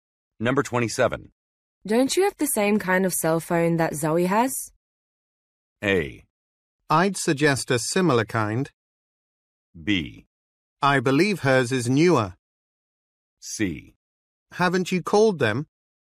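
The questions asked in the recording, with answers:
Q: Don't you have the same kind of cell phone that Zoe has?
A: B: I believe hers is newer.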